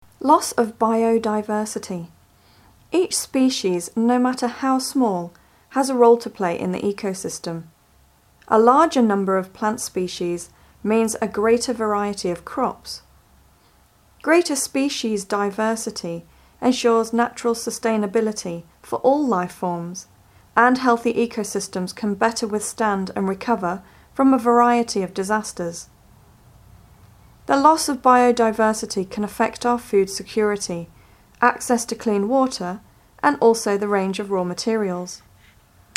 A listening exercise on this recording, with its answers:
Listen to the recordings and fill in the gaps. You may use no more than 3 words and/or numbers to complete the sentences.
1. Each species, no matter how small, has a role to play in the (1) .....................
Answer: ecosystem

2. A larger number of plant species means a greater variety of (2)....................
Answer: crops

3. Greater species diversity ensures (3) ...................... for all life forms; and healthy ecosystems can better withstand and recover from a variety of disasters.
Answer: natural sustainability

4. The loss of biodiversity can affect our (4).................., access to clean water and also the range of raw materials.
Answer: food security